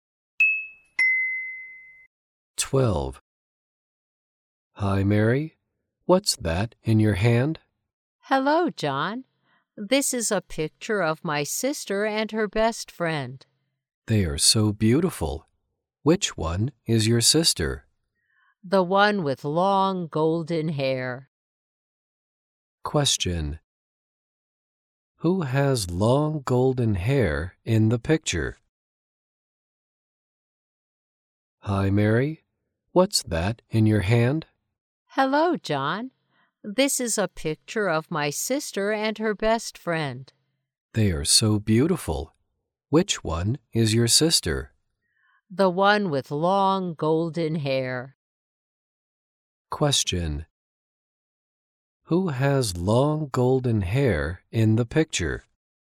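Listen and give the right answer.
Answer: Mary's sister.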